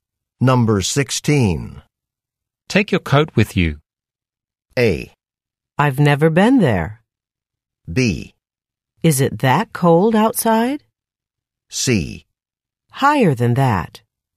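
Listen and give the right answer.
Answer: B: Is it that cold outside?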